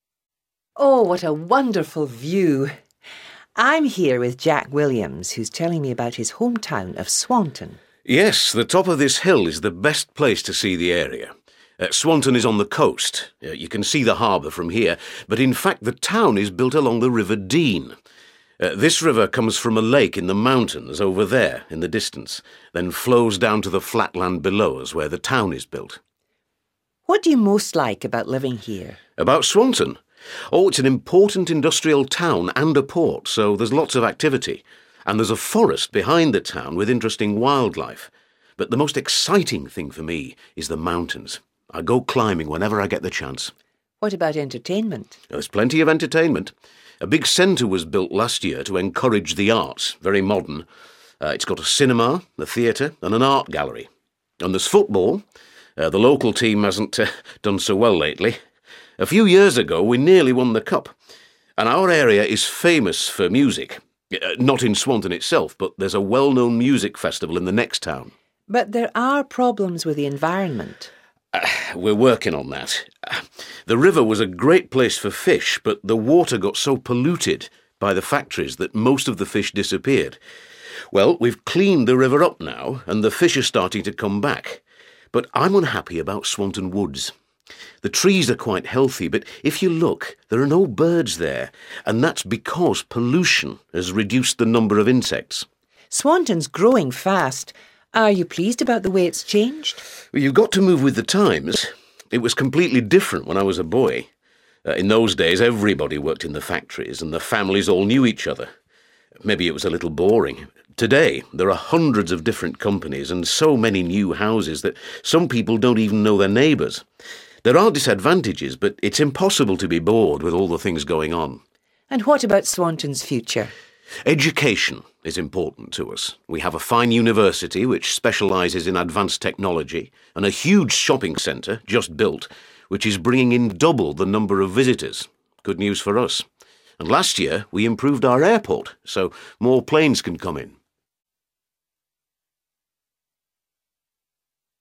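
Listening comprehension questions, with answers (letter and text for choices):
Listen to the following interview and choose the best answer A, B or C for the question below.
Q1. Where is the town of Swanton located?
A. Near the sea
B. On a hill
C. By a lake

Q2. What does Jack say about the way Swanton has changed?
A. He preferred the town when it was smaller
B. He is sorry that there are fewer jobs available.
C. He thinks it is a more interesting place.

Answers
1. A. Near the sea
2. C. He thinks it is a more interesting place.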